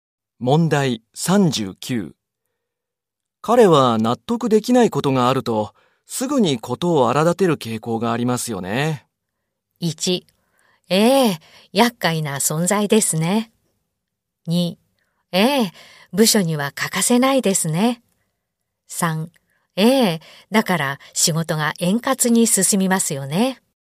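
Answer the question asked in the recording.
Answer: 1: ええ、厄介な存在ですね。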